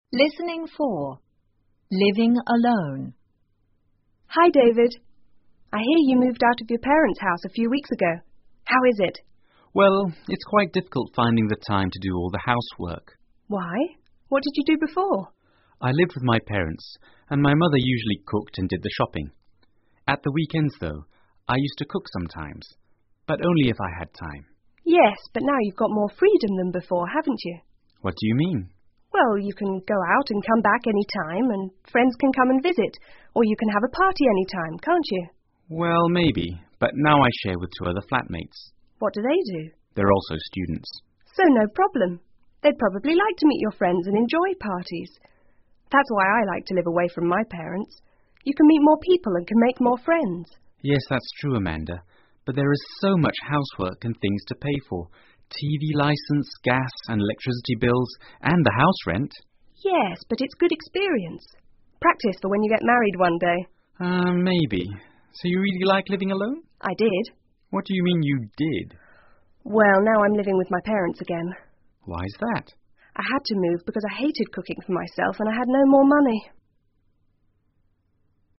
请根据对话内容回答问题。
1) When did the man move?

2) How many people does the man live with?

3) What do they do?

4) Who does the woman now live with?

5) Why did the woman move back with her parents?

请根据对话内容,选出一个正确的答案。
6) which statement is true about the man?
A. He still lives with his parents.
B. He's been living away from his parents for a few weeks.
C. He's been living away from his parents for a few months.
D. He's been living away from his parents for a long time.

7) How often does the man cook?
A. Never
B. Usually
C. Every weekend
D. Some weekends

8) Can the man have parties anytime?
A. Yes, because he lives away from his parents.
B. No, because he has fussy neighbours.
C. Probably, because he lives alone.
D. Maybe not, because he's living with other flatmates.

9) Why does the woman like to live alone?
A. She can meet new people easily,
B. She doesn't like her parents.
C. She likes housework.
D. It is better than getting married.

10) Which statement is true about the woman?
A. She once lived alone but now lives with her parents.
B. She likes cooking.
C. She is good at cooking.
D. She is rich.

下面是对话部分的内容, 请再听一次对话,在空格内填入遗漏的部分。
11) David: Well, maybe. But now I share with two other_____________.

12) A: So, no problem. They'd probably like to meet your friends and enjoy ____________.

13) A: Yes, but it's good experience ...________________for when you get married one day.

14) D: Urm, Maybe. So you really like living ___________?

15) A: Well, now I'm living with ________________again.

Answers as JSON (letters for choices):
{"1": "A few weeks ago", "2": "Two", "3": "Students", "4": "Her parents", "5": "She hated cooking for herself,and she had no more money.", "6": "B", "7": "D", "8": "D", "9": "A", "10": "A", "11": "flatmates", "12": "parties", "13": "practice", "14": "alone", "15": "my parents"}

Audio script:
Amanda:Hi,David.I hear you moved out of your parents' house a few weeks ago.How is it?
David:Well,it's quite difficult finding the time to do all the housework.
A:Why?What did you do before?
D:I lived with my parents and my mother usually cooked and did the shopping.At the weekends though,I used to cook sometimes,but only if I had time.
A:Yes,but now you've got more freedom that before,haven't you?
D:What do you mean?
A:Well,you can go out and come back anytime,and friends can come and visit or you can have a party anytime,can't you?
D:Well,maybe.But now I share with two other flatmates.
D:They're also students.
A:So,no problem.They'd probably like to meet your friends and enjoy parties.That's why I like to live away from my parents.You can meet more people and can make more friends.
D:Yes,that's true,Amanda.But there is so much housework and things to pay for.TV licence,gas and electricity bills,and the house rent.
A:Yes,but it's good experience...practice for when you get married one day.
D:Urm.Maybe.So you really like living alone?
A:I did.
A:Well,now I'm living with my parents again.
A:I had to move because I hated cooking for myself,and I had no more money.